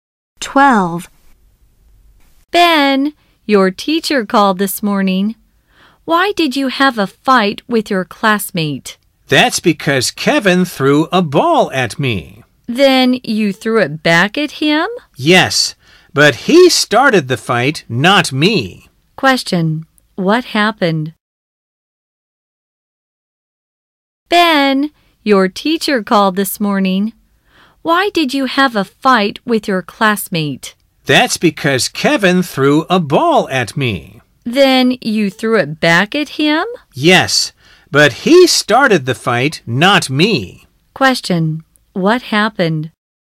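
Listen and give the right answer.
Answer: Ben had a fight with Kevin after Kevin threw a ball at him.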